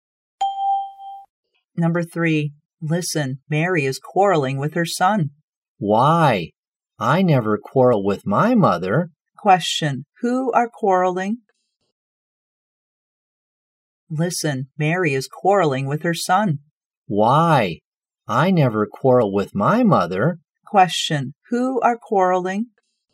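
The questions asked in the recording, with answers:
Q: who are quarreling?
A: Mary and her son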